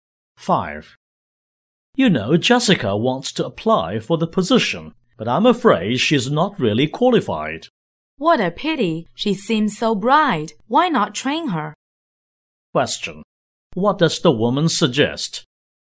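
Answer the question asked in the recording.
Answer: Training Jessica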